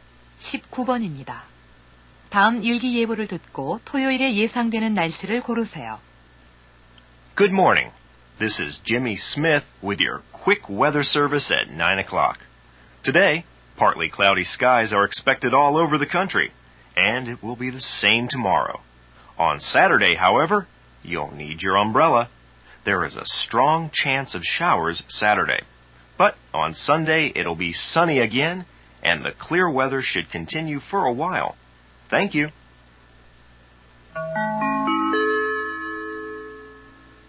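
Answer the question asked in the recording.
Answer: 소나기(비)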